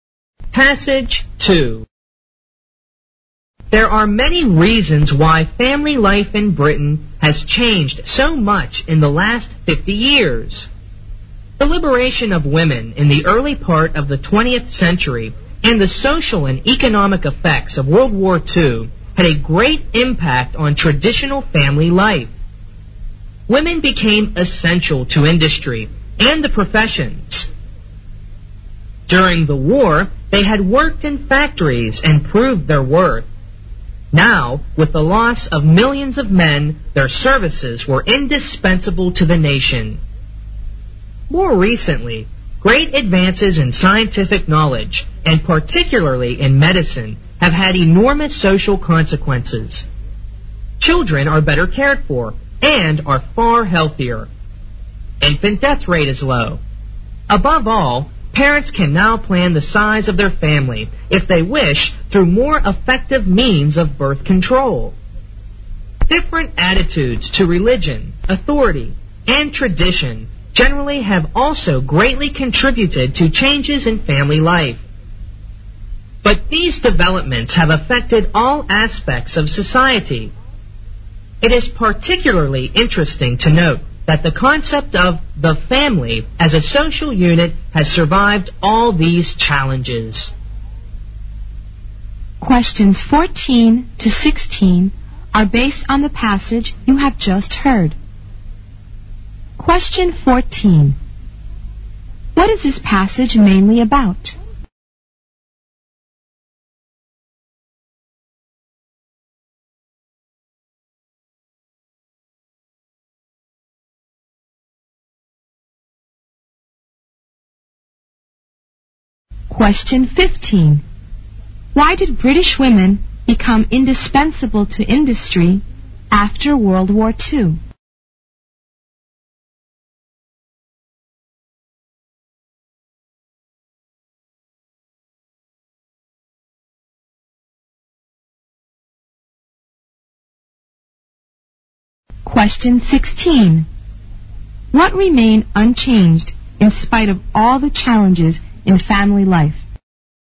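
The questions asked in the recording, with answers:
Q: What is this passage mainly about?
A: Reasons for changes in British family life

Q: Why did British women become indispensable to industry after World War II?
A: Millions of men had been lost in the war

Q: What remained unchanged in spite of all the challenges in family life?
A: The family as a social unit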